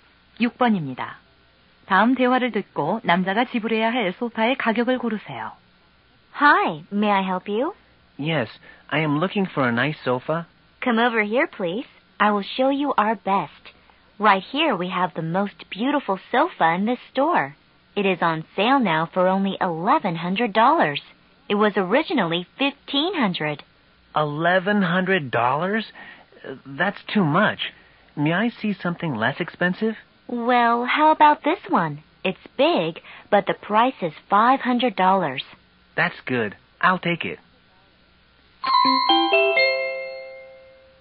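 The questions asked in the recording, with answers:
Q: 다음 대화를 듣고 남자가 지불해야 할 소파의 가격을 고르세요.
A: 500달러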